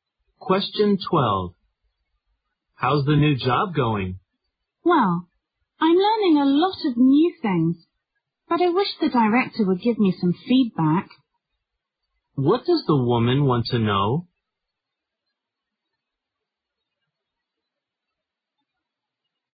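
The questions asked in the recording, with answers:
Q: What does the woman want to know?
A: How well she is doing in her new job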